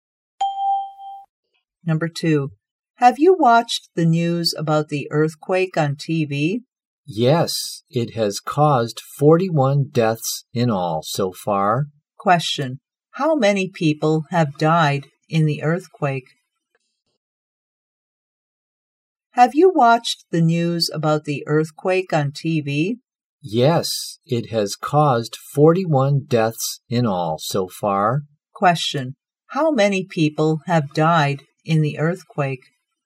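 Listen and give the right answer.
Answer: 41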